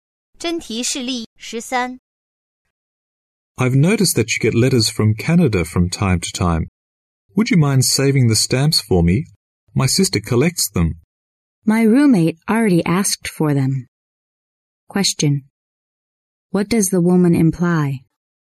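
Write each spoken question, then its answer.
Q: What does the woman imply?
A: She can't save the stamps for him; her roommate already asked for them.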